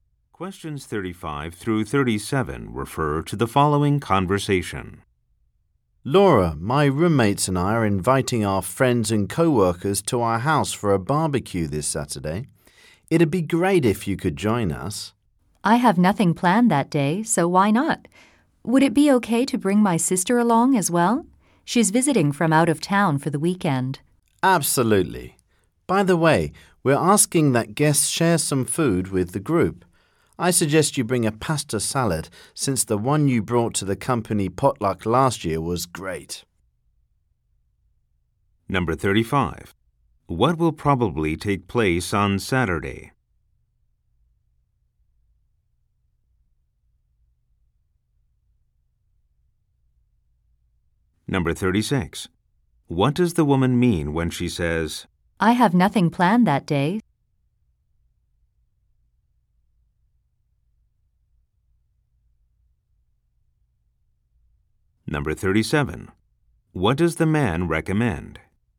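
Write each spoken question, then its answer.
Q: What will probably take place on Saturday?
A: A barbecue

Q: What does the woman mean when she says,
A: She can attend the barbecue

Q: What does the man recommend?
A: Bringing a pasta salad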